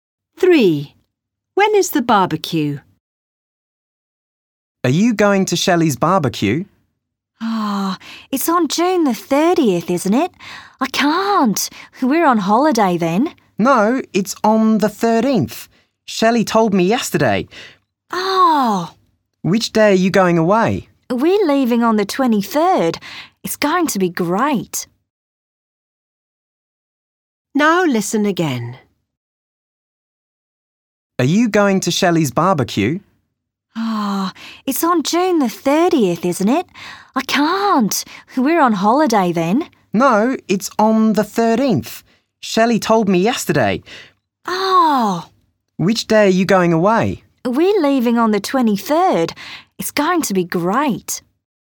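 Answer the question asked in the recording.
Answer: June the 13th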